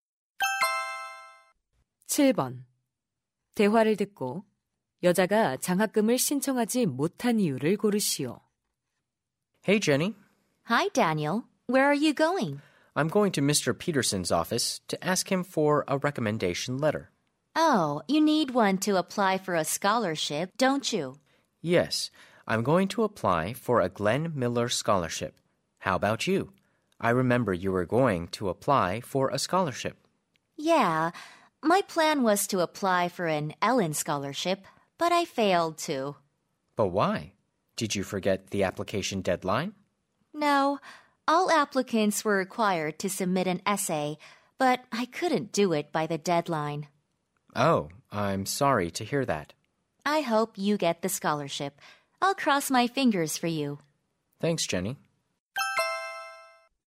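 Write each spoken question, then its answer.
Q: 대화를 듣고 여자가 장학금을 신청하지 못한 이유를 고르시오.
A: 마감 기한까지 에세이를 제출하지 못해서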